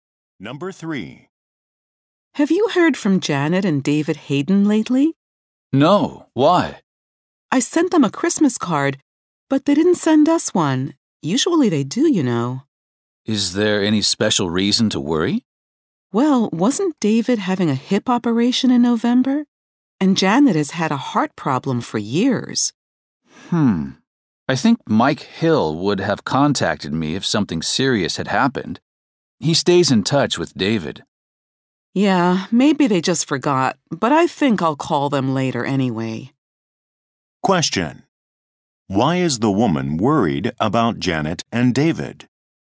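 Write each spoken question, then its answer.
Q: Why is the woman worried about Janet and David?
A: They didn't send a Christmas card, and they have health problems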